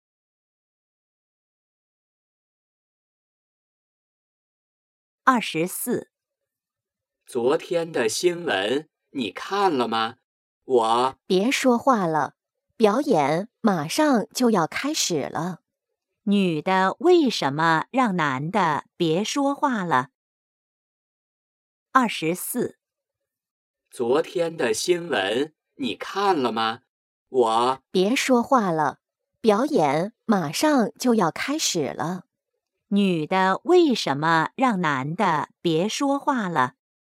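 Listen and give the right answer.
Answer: 表演马上就要开始了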